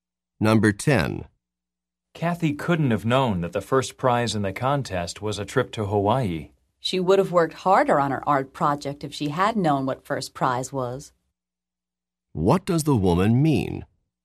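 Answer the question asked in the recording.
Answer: Kathy didn't know what the first prize was, so she didn't work hard.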